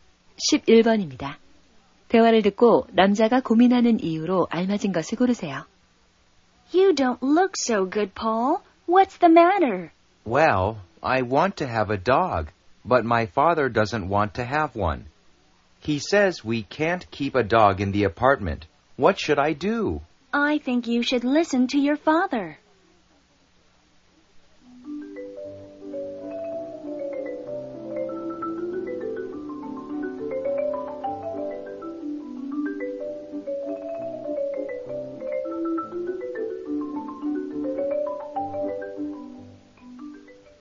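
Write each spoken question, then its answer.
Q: 대화를 듣고 남자가 고민하는 이유로 알맞은 것을 고르세요.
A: 개를 키우고 싶은데 아버지가 반대해서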